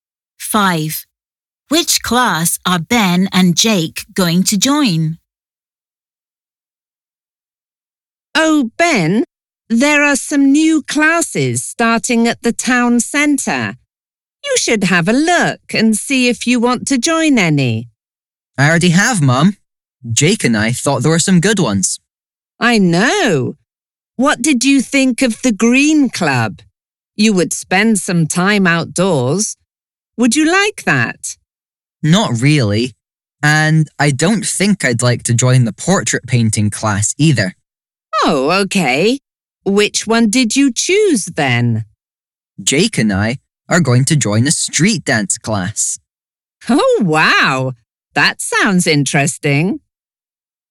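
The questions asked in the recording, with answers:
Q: Which class are Ben and Jake going to join?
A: A street dance class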